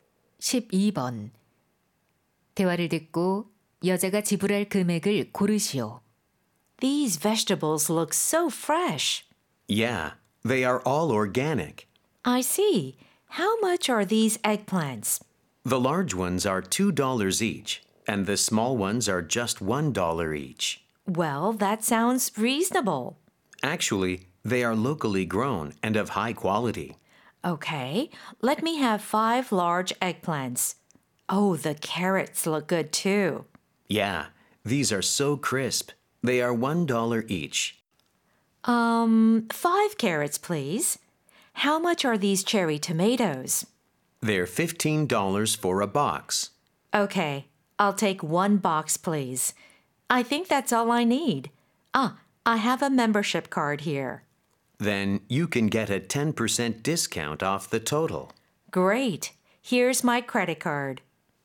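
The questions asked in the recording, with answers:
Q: 대화를 듣고 여자가 지불할 금액을 고르시오.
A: $27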